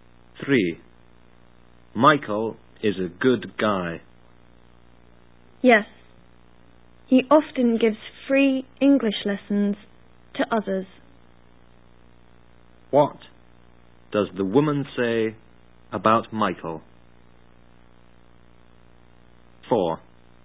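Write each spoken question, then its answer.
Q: What does the woman say about Michael?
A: He often gives free English lessons to others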